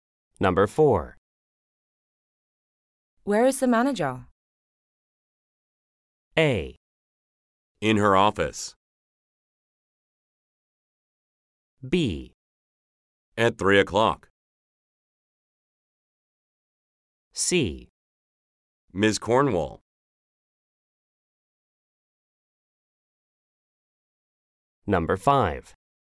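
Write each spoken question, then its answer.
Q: Where is the manager?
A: A: In her office.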